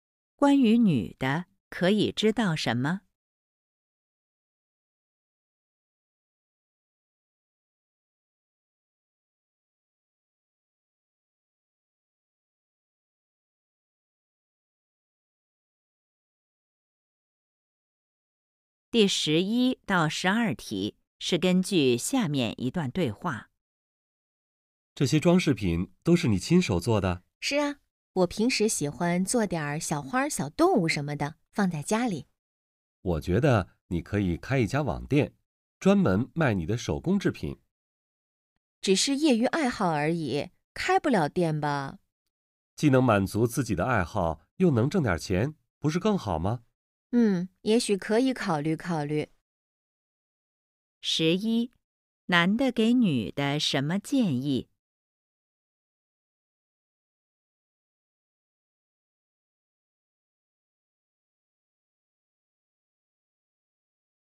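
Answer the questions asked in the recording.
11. 开一家网店卖手工制品
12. 可以考虑考虑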